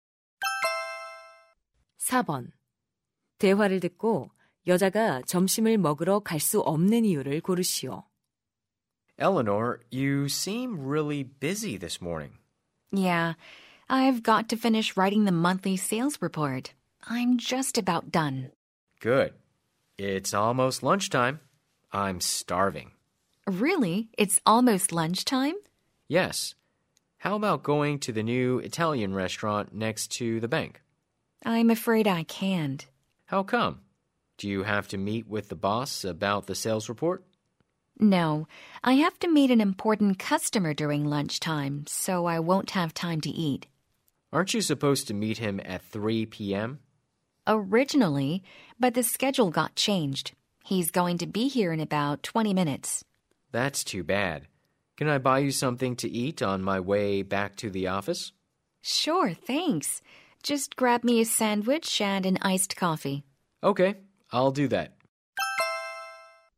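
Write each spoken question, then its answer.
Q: 대화를 듣고 여자가 점심을 먹으러 갈 수 없는 이유를 고르시오.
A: 점심시간에 중요한 고객을 만나야 해서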